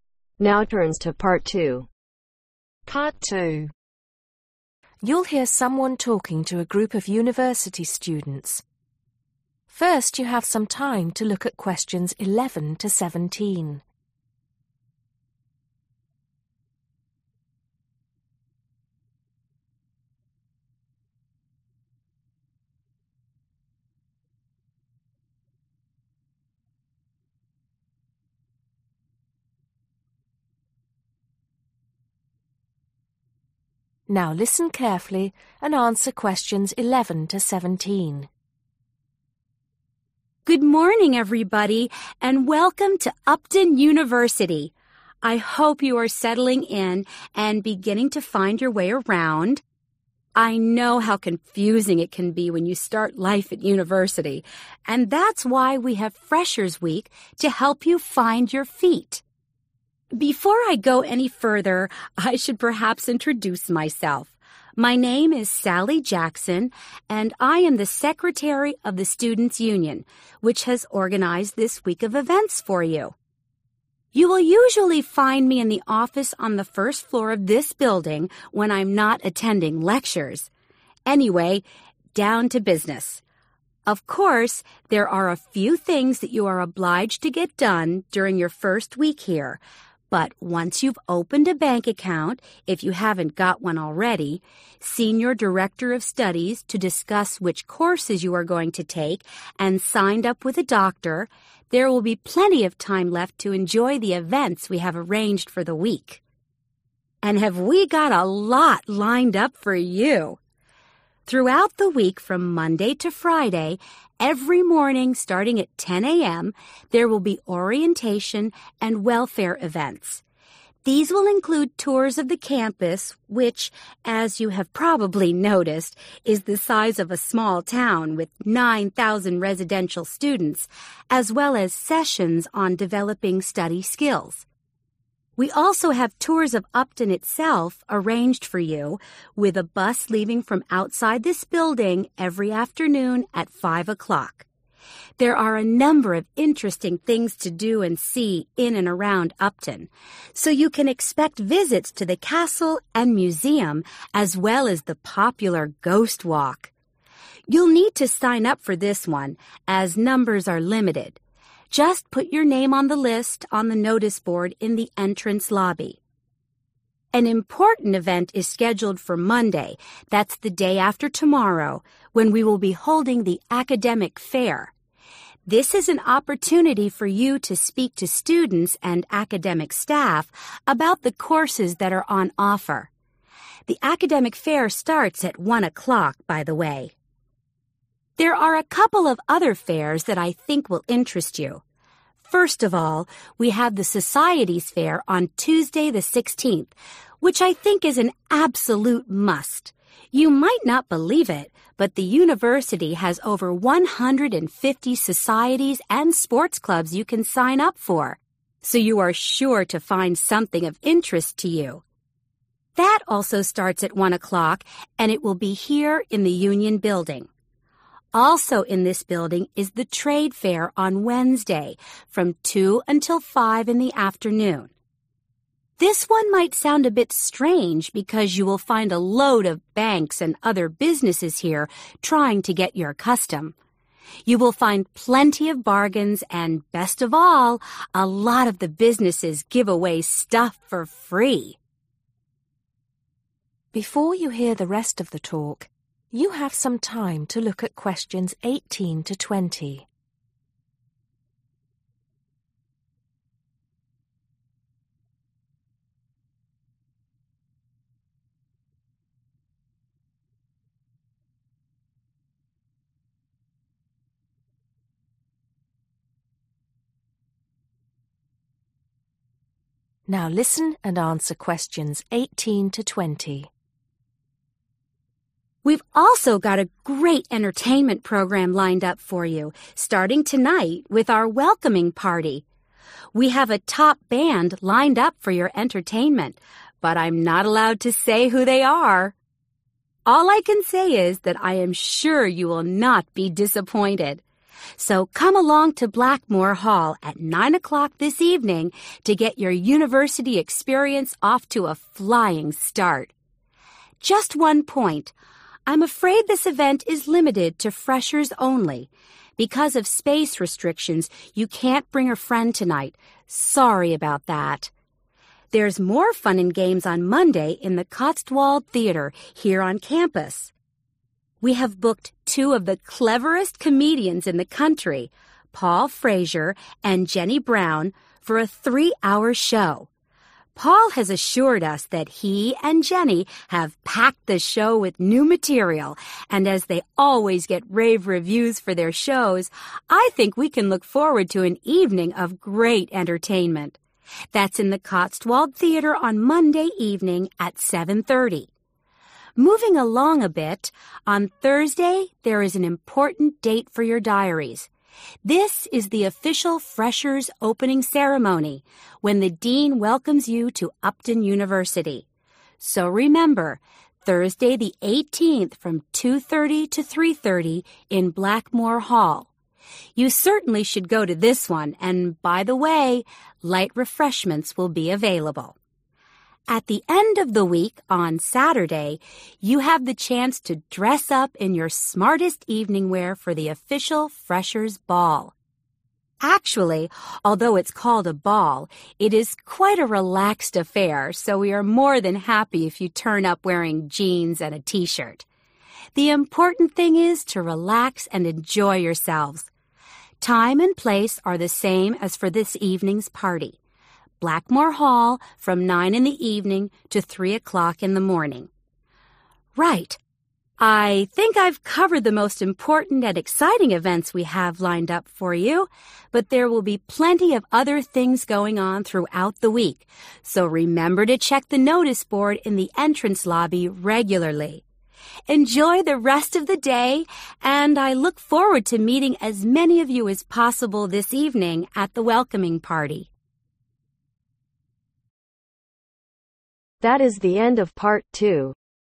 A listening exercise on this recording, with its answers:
Choose the correct letter A, B or C.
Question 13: Tour of campus sessions to develop (13) ..........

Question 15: Talk to students and (15) ..........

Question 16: More than (16) .......... societies and sports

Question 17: (17) ..........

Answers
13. study skills
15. academic staff
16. 150
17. Trade fair